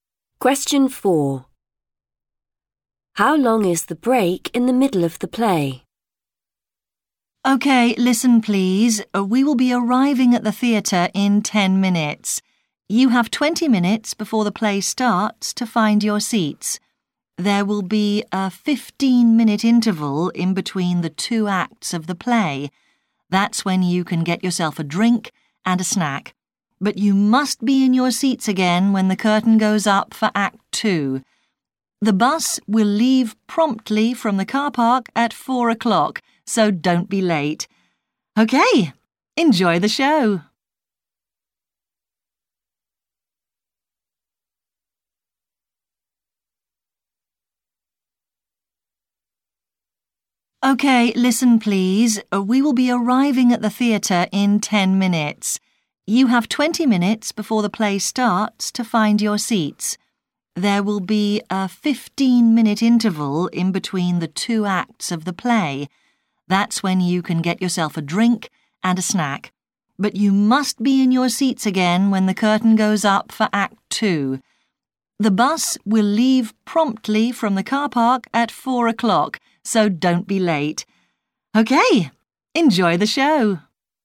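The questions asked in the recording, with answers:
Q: How long is the break in the middle of the play?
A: 15 minutes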